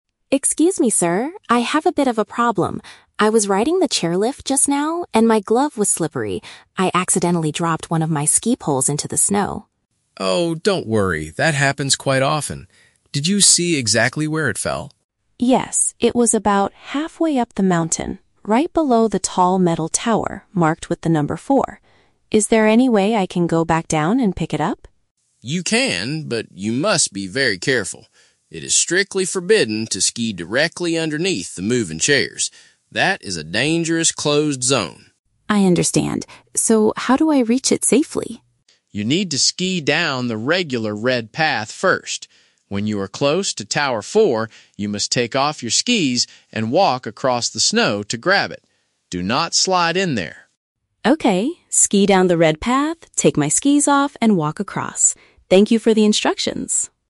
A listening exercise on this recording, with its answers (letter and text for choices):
Listen to the conversation between a skier and a ski lift operator. Choose the correct answer (A, B, or C) for each question.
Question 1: Why is the skier talking to the lift operator?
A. He wants to complain about the slippery seats on the chairlift.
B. He lost a piece of his skiing equipment on the way up.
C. He needs medical help after falling down near a metal tower.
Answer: B. He lost a piece of his skiing equipment on the way up.

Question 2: Where exactly is the missing item located?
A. In the middle of the mountain, under a numbered structure.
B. At the very bottom of the red path, next to the warning signs.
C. Inside the operator's office at the top of the ski resort.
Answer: A. In the middle of the mountain, under a numbered structure.

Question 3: What is the operator's most important safety instruction?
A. To wait for a rescue team to bring the item back to him.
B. To hold onto the chairlift tightly with both hands next time.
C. To never slide down the snow directly below the lift system.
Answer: C. To never slide down the snow directly below the lift system.

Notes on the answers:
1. The skier says, "I accidentally dropped one of my ski poles into the snow." A ski pole is a "piece of skiing equipment," and dropping it means he "lost" it.
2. The skier says it fell "halfway up the mountain, right below the tall metal tower marked with the number four." "Halfway up" matches "in the middle," and a tower marked with a number is a "numbered structure."
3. The operator warns that "It is strictly forbidden to ski directly underneath the moving chairs." This perfectly paraphrases option C: "never slide down the snow directly below the lift system."

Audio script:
Skier: Excuse me, sir! I have a bit of a problem. I was riding the chairlift just now, and my glove was slippery. I accidentally dropped one of my ski poles into the snow.
Operator: Oh, don't worry, that happens quite often. Did you see exactly where it fell?
Skier: Yes, it was about halfway up the mountain, right below the tall metal tower marked with the number four. Is there any way I can go back down and pick it up?
Operator: You can, but you must be very careful. It is strictly forbidden to ski directly underneath the moving chairs. That is a dangerous closed zone.
Skier: I understand. So how do I reach it safely?
Operator: You need to ski down the regular red path first. When you are close to tower four, you must take off your skis and walk across the snow to grab it. Do not slide in there.
Skier: Okay, ski down the red path, take my skis off, and walk across. Thank you for the instructions!